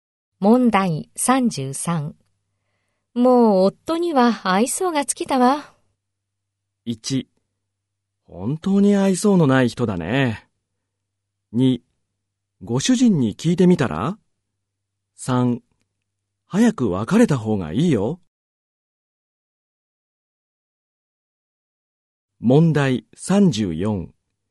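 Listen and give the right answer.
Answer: 3: 早く別れた方がいいよ。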